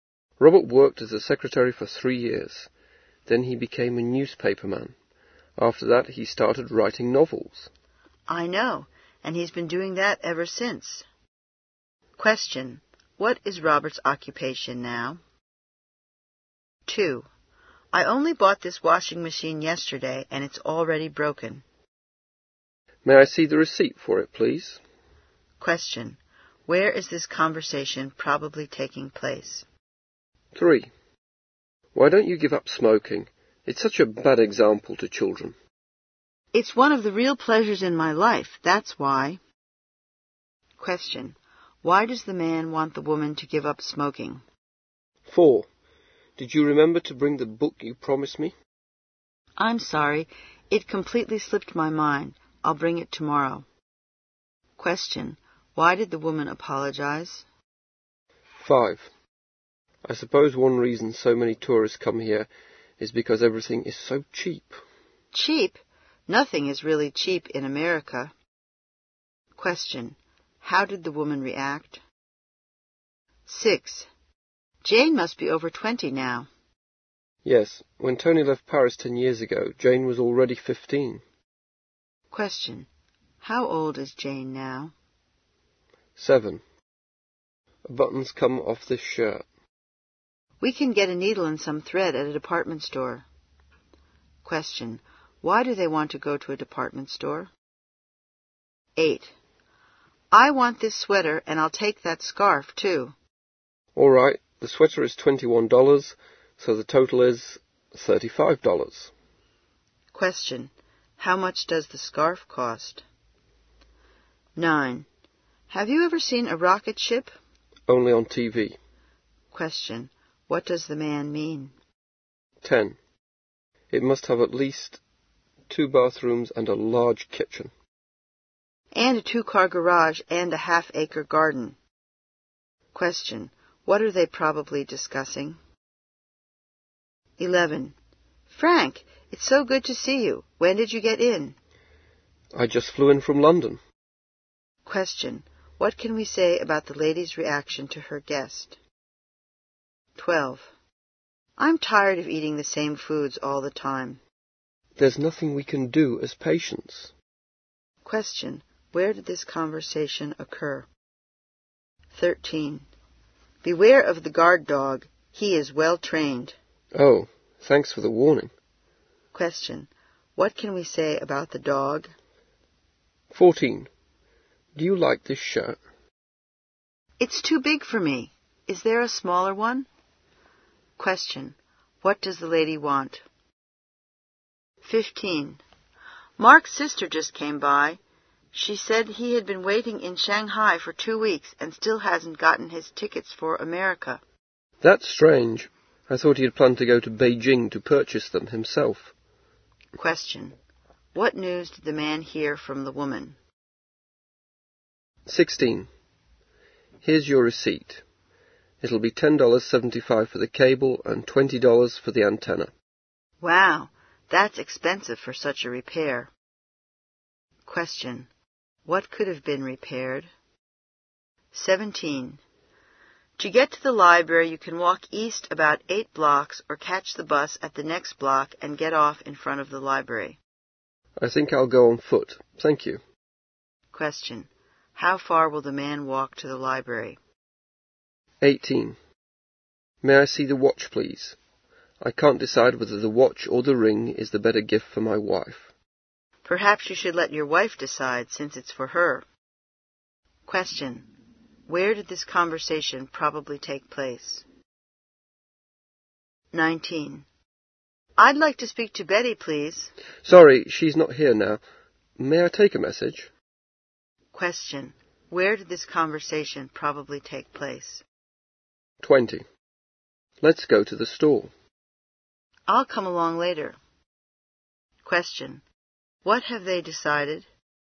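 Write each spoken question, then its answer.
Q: What is Robert's occupation now?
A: He writes novels (a novelist).

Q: Where is this conversation probably taking place?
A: In a store

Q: Why does the man want the woman to give up smoking?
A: It's a bad example to children.

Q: Why did the woman apologize?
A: She forgot to bring the book she promised.

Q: How did the woman react?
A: She disagreed; nothing is really cheap in America.

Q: How old is Jane now?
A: 25

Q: Why do they want to go to a department store?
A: To get a needle and thread to sew on a button.

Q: How much does the scarf cost?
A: $14

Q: What does the man mean?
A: He has only seen one on TV.

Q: What are they probably discussing?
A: A house they want

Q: What can we say about the lady's reaction to her guest?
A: She is glad to see him.

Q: Where did this conversation occur?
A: In a hospital

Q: What can we say about the dog?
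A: It is a well-trained guard dog.

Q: What does the lady want?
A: A smaller shirt

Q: What news did the man hear from the woman?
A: Mark has waited in Shanghai two weeks and still hasn't got his tickets for America.

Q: How far will the man walk to the library?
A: About 8 blocks

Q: Where did this conversation probably take place?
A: In a jewelry store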